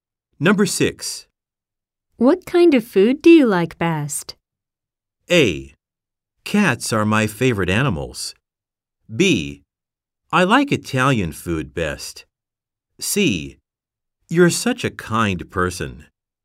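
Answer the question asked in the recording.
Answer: B: I like Italian food best.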